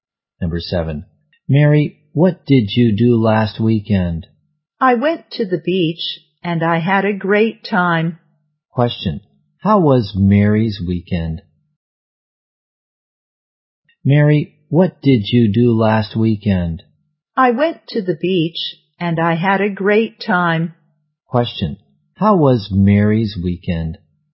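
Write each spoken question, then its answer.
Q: Question, how was Mary's weekend?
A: Great; she had a great time at the beach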